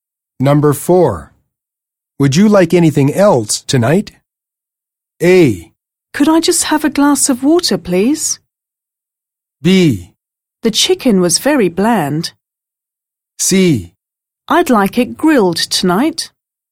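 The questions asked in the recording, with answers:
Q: Would you like anything else tonight?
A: A: Could I just have a glass of water, please?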